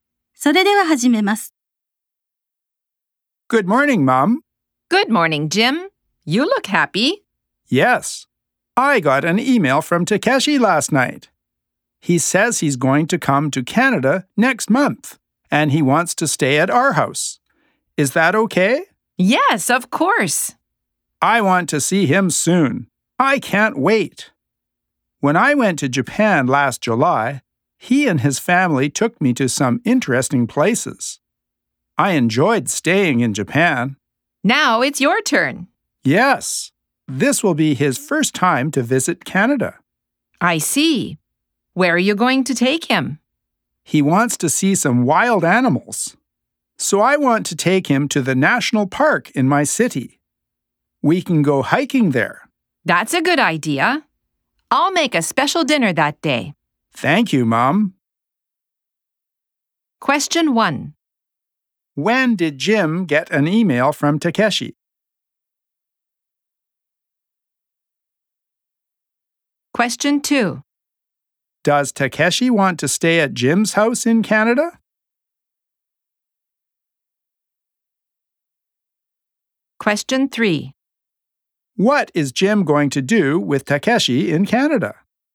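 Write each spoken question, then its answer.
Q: When did Jim get an email from Takeshi?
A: Last night.

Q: Does Takeshi want to stay at Jim's house in Canada?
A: Yes, he does.

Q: What is Jim going to do with Takeshi in Canada?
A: Take him to the national park and go hiking.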